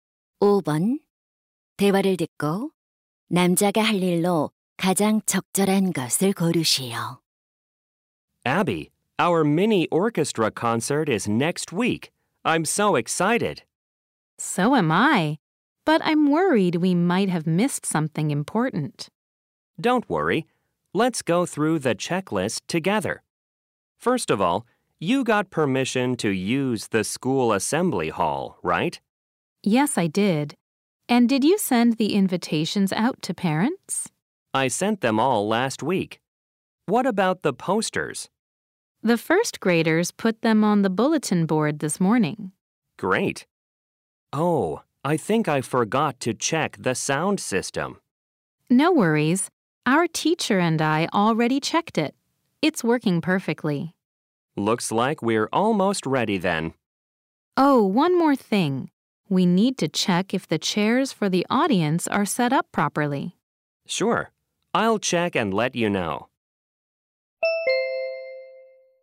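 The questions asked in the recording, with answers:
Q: 대화를 듣고 남자가 할 일로 가장 적절한 것을 고르시오.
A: 관객용 의자 배치 확인하기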